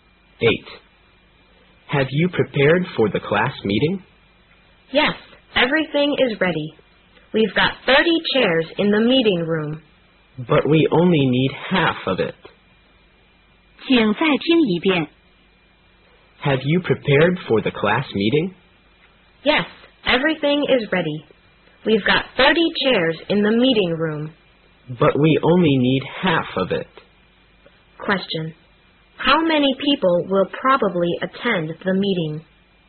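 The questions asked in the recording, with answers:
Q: How many people will probably attend the meeting?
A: 15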